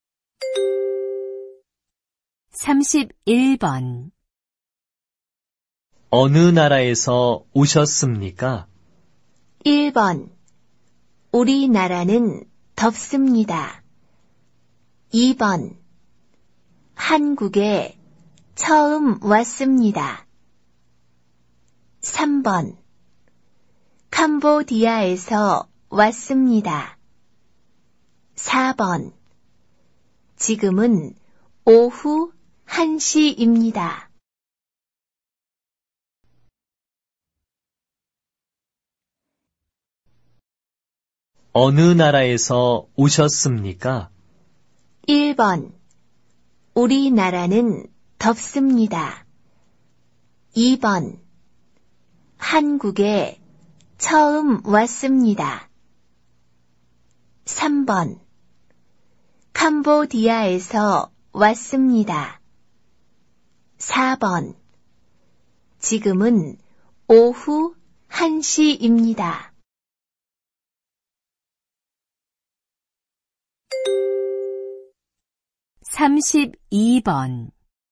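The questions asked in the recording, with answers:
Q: 어느 나라에서 오셨습니까?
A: 3: 캄보디아에서 왔습니다.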